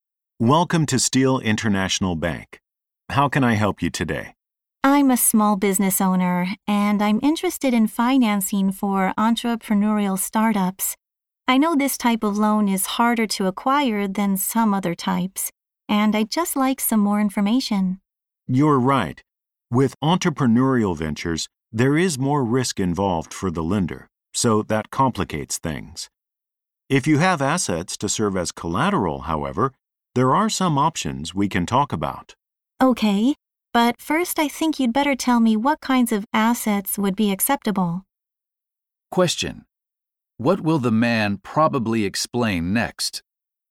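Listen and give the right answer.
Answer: What kinds of assets are acceptable as collateral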